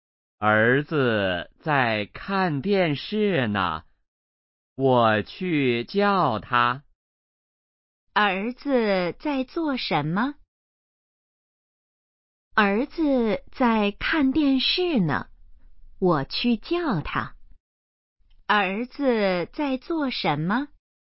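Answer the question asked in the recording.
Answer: 看电视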